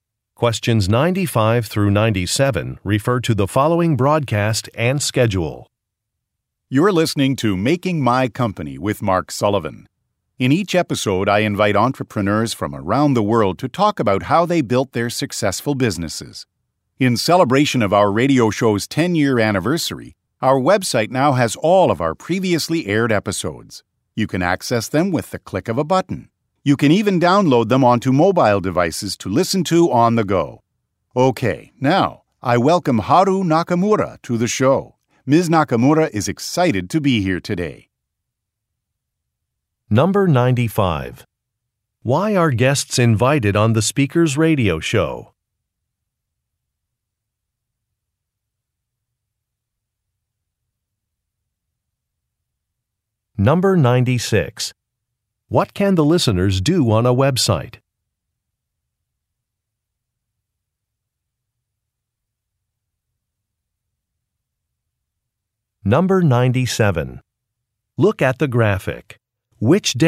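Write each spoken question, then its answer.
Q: Why are guests invited on the speaker's radio show?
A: To talk about how they built their successful businesses

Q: What can the listeners do on a website?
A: Access and download all previously aired episodes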